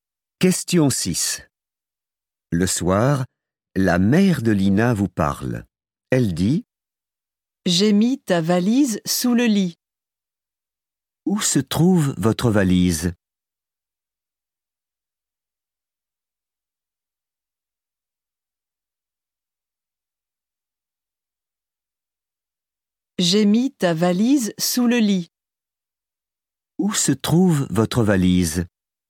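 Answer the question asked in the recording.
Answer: sous le lit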